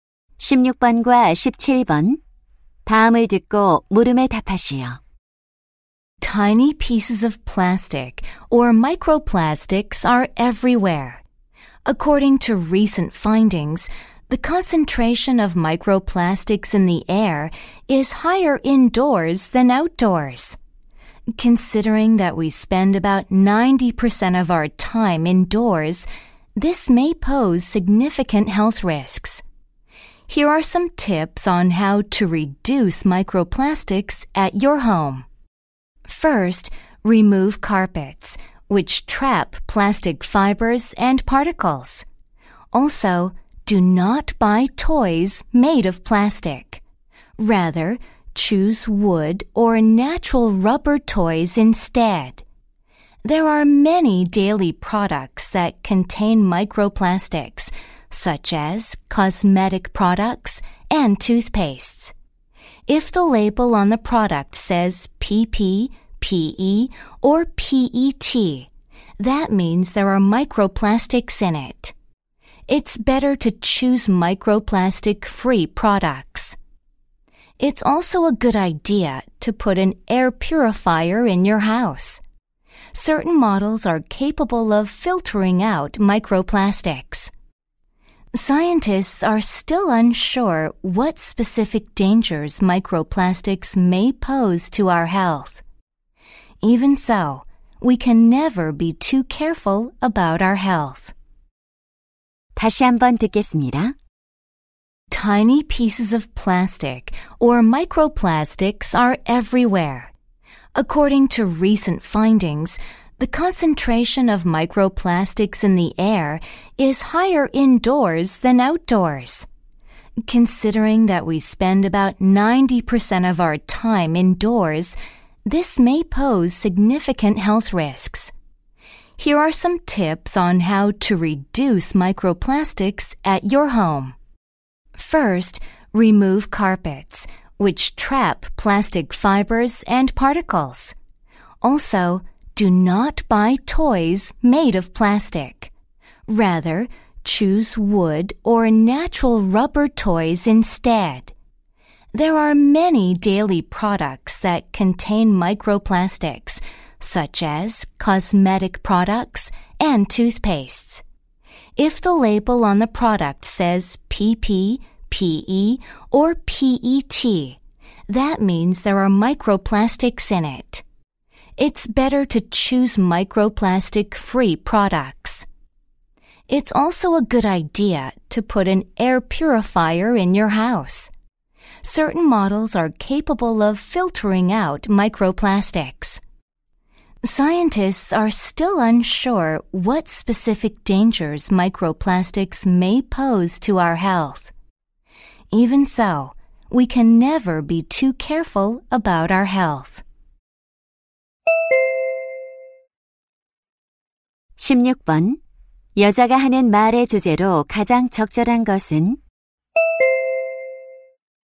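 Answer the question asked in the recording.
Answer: 집 안의 미세플라스틱을 줄이는 방법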